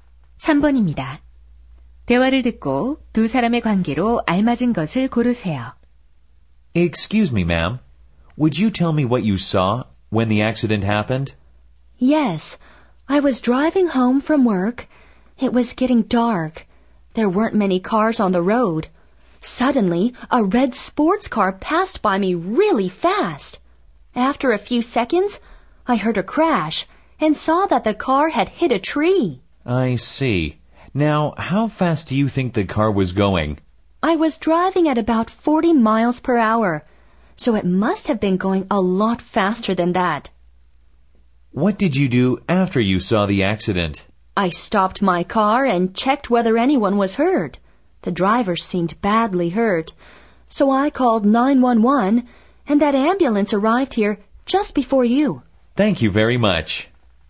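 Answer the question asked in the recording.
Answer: 경찰관과 사고 목격자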